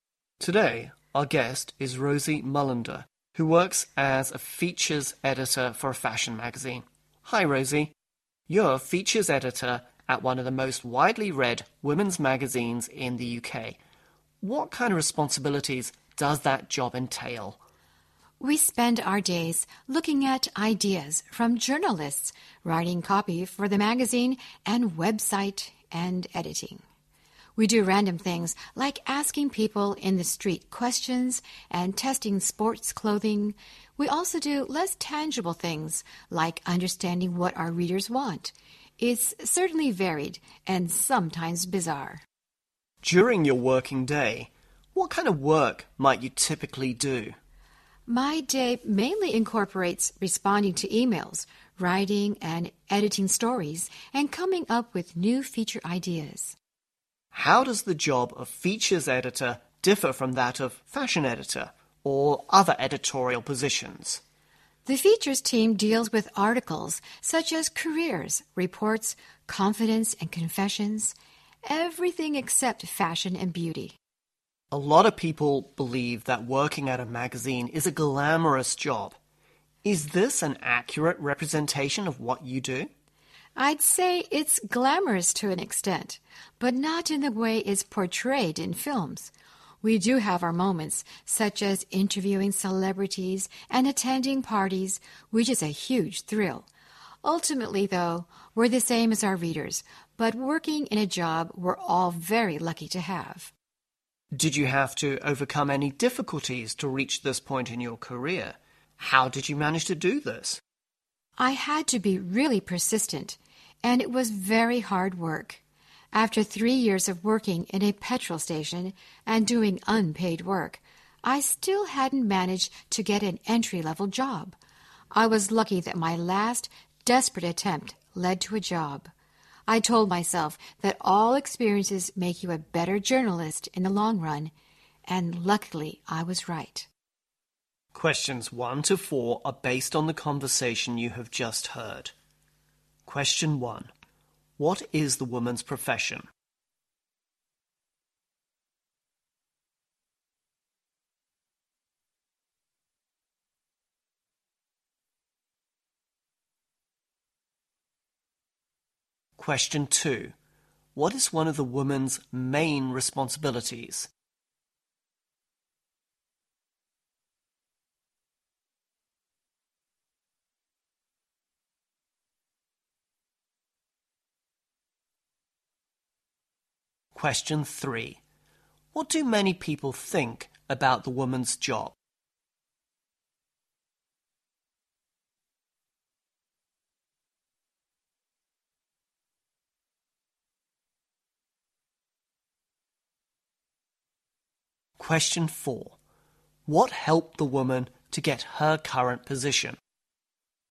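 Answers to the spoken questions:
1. Features editor at a fashion/women's magazine
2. Writing and editing stories (and responding to emails, coming up with feature ideas)
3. That it is glamorous
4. Being persistent and working hard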